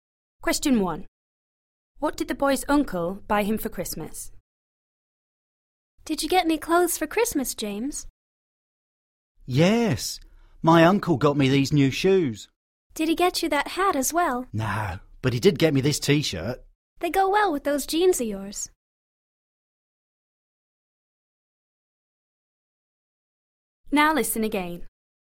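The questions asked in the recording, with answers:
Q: What did the boy's uncle buy him for Christmas?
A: New shoes and a T-shirt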